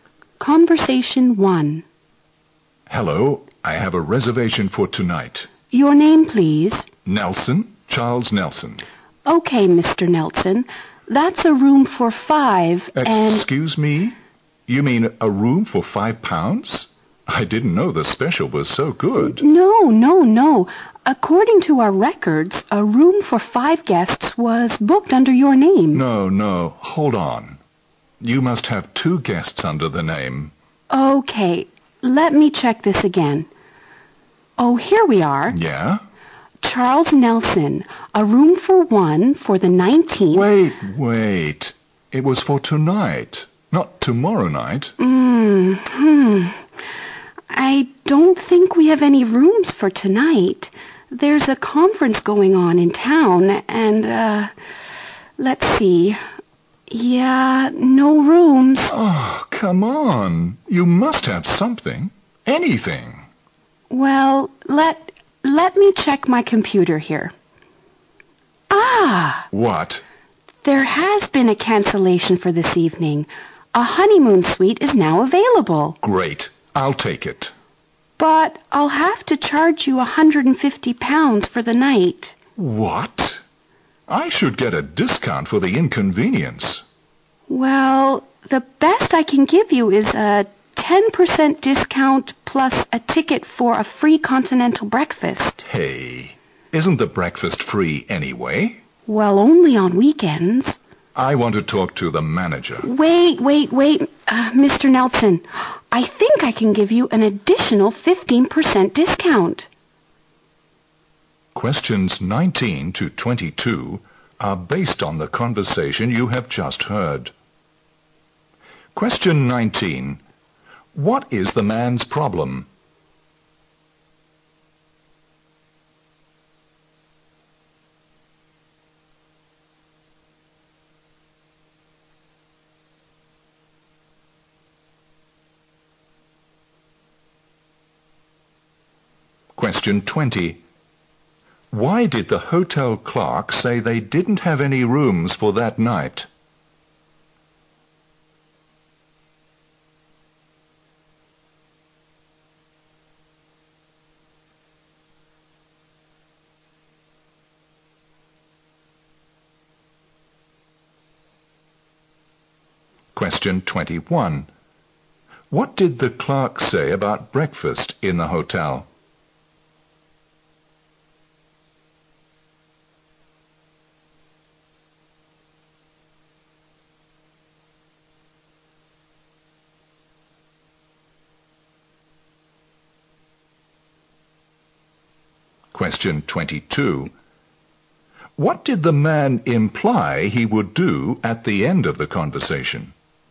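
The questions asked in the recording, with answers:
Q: What is the man's problem?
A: The hotel booked his room for the wrong night.

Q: Why did the hotel clerk say they didn't have any rooms for that night?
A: There was a conference going on in town.

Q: What did the clerk say about breakfast in the hotel?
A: It is free only on weekends.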